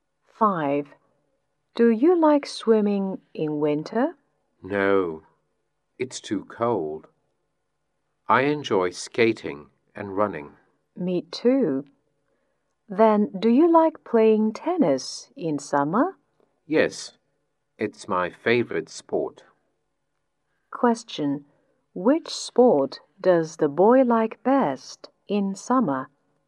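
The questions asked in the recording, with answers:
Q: Which sport does the boy like best in summer?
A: Tennis.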